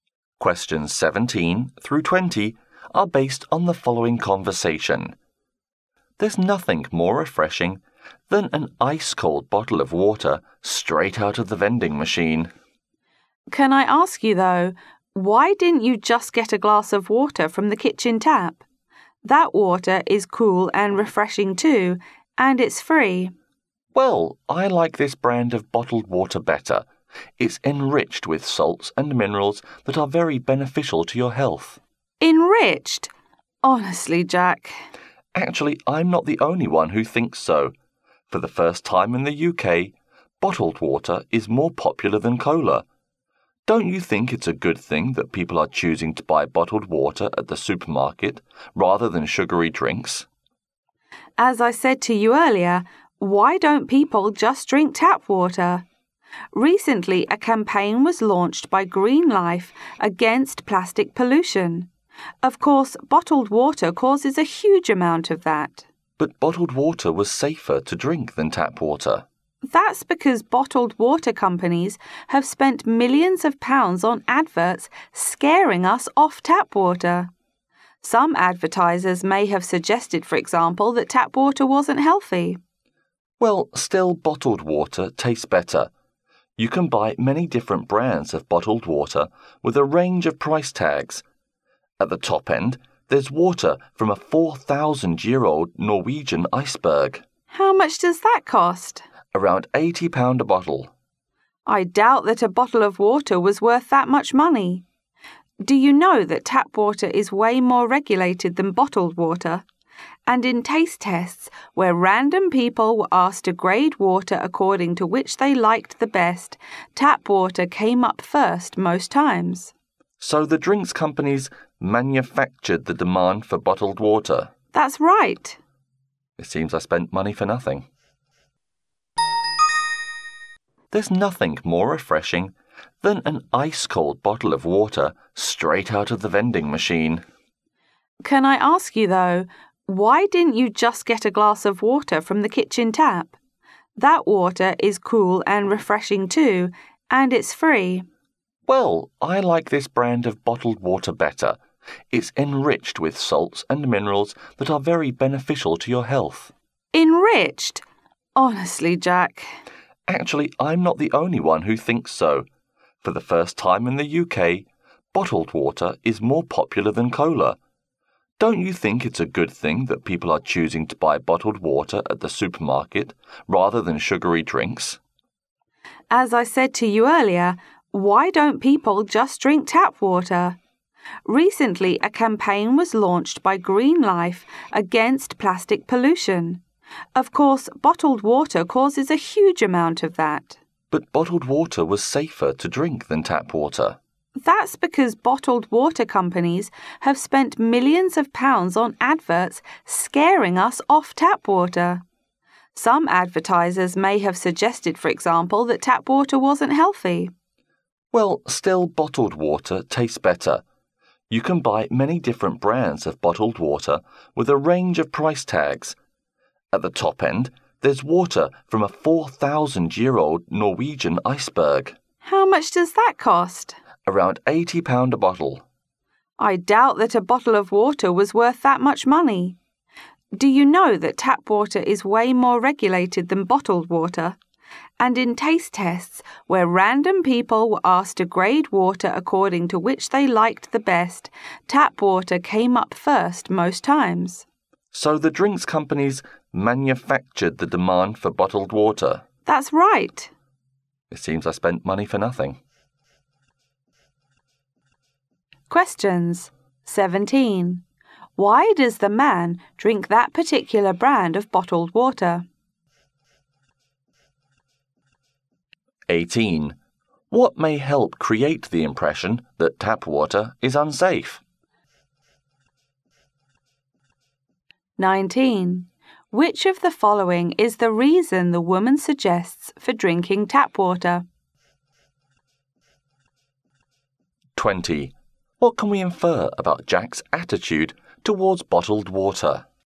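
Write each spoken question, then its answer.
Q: Why does the man drink that particular brand of bottled water?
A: He thinks its salts and minerals are good for his health

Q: What may help create the impression that tap water is unsafe?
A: Bottled water companies' adverts

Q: What can we infer about Jack's attitude towards bottled water?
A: He now thinks buying it is a waste of money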